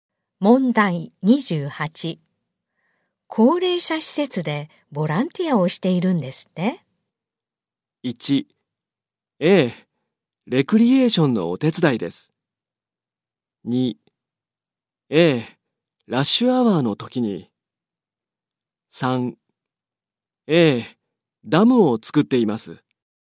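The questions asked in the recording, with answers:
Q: 高齢者施設でボランティアをしているんですって?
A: 1: ええ、レクリエーションのお手伝いです。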